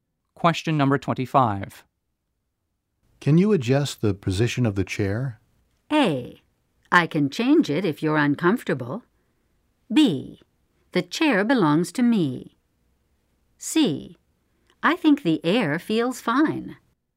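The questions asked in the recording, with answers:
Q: Can you adjust the position of the chair?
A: A: I can change it if you're uncomfortable.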